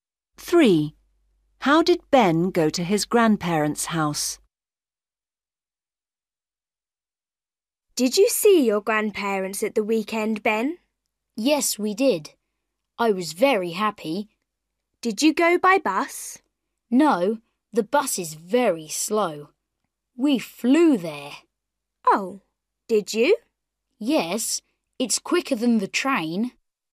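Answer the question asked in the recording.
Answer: by plane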